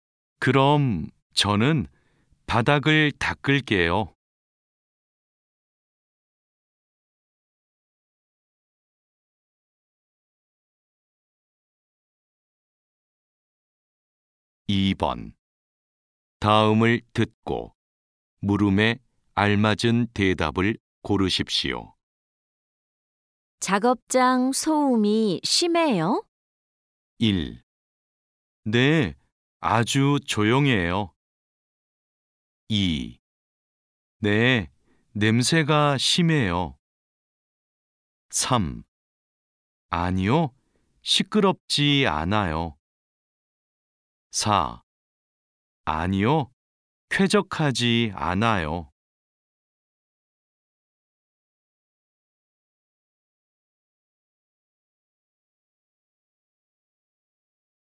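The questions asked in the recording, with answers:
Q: 작업장 소음이 심해요?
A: 3: 아니요, 시끄럽지 않아요.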